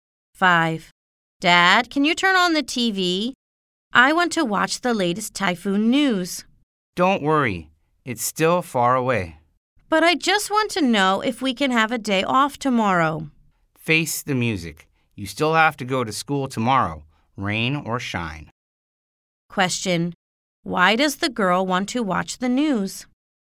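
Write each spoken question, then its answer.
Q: Why does the girl want to watch the news?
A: She wants to know if she can have a day off tomorrow.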